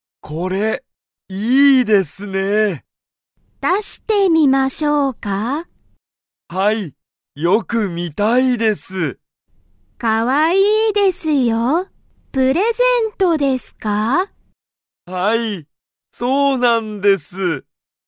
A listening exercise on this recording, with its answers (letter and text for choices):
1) ユタカは____を見(み)ている。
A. 映画(えいが)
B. プレゼント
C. ケーキ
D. 本(ほん)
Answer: B. プレゼント

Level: Level 1